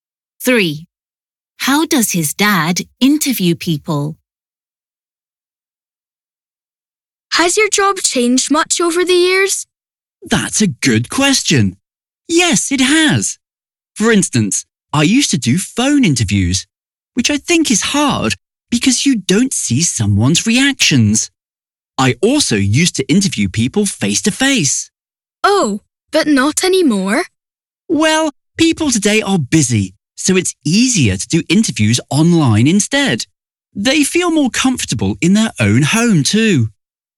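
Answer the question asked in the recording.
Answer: Online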